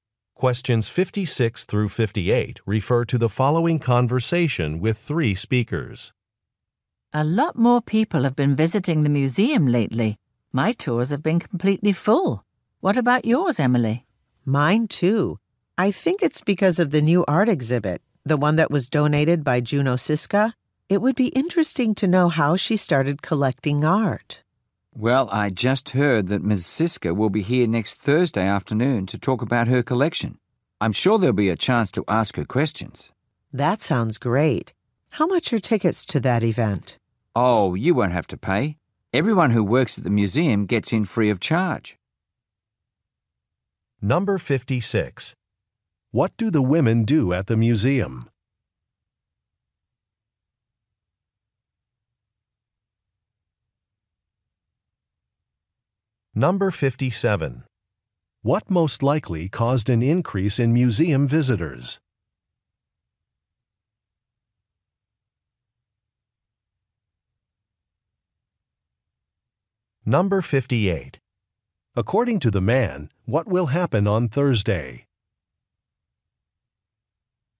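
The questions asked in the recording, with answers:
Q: What do the women do at the museum?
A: Lead tours

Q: What most likely caused an increase in museum visitors?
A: A new art exhibit

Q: According to the man, what will happen on Thursday?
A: Juno Siska will talk about her collection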